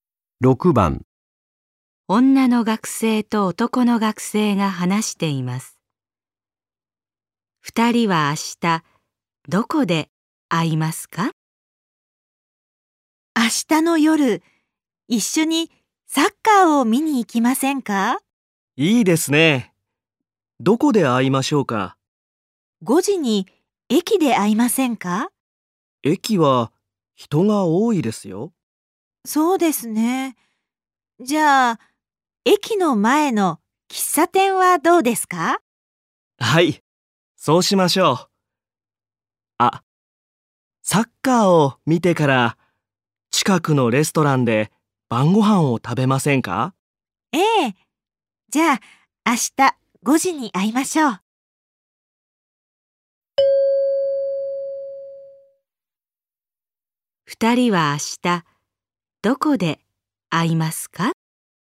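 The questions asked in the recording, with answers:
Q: 二人は明日どこで会いますか?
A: 駅の前の喫茶店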